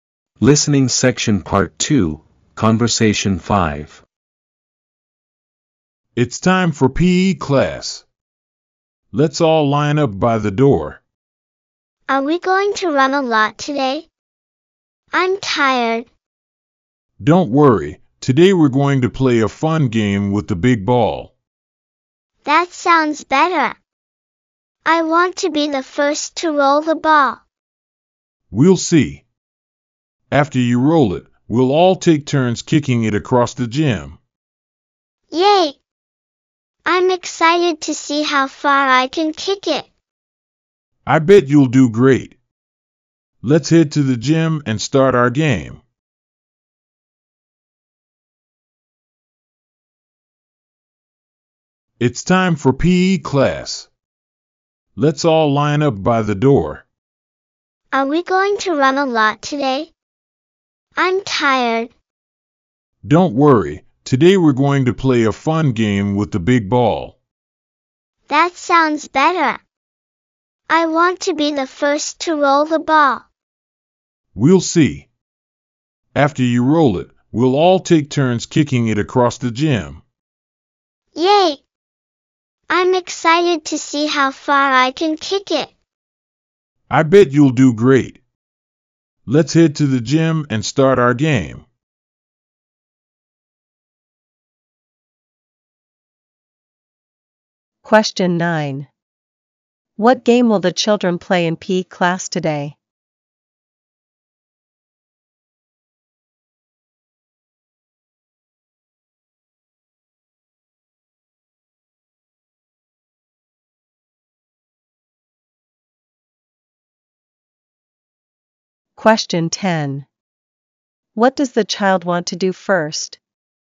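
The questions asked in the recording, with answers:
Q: What game will the children play in PE class today?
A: A fun game with the big ball (rolling and kicking it across the gym)

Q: What does the child want to do first?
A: Be the first to roll the ball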